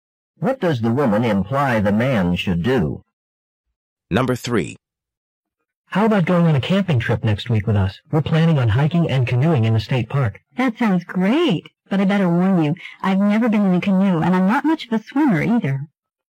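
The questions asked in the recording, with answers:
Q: What does the woman mean?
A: She would like to go but is worried about canoeing because she has no experience and can't swim well.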